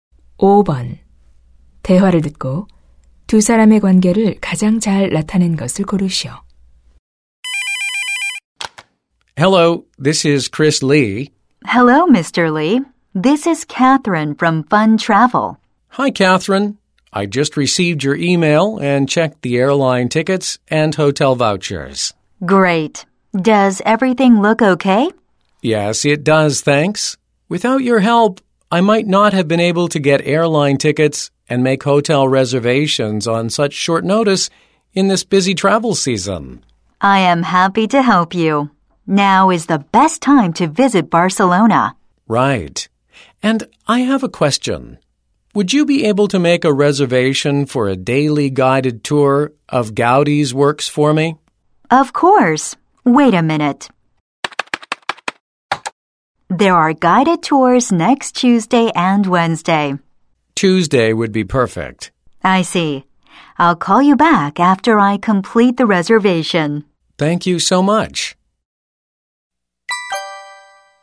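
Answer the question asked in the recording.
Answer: 여행사 직원 - 고객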